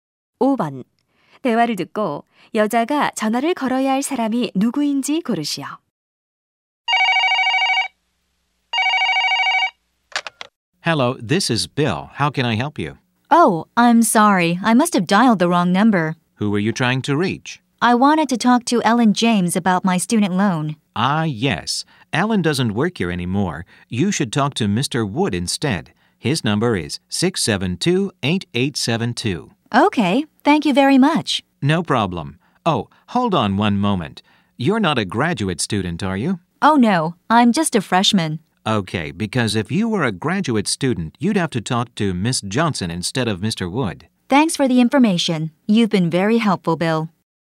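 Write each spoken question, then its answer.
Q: 대화를 듣고 여자가 전화를 걸어야 할 사람이 누구인지 고르시오.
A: Mr. Wood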